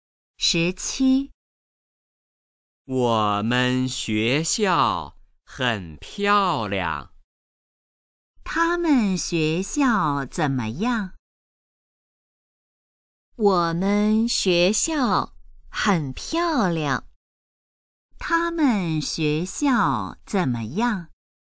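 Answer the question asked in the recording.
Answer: 很漂亮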